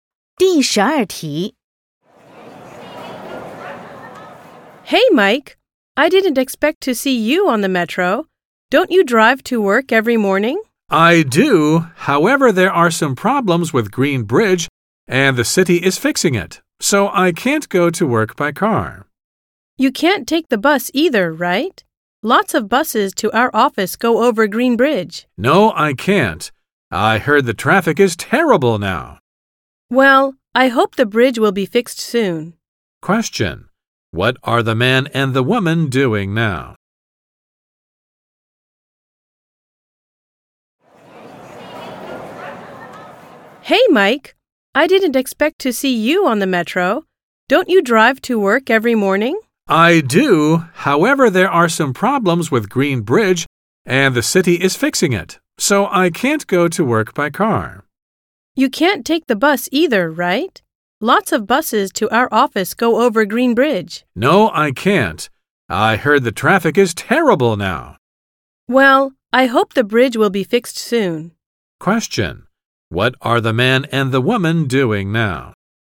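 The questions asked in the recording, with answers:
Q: What are the man and the woman doing now?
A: Taking the metro (to work)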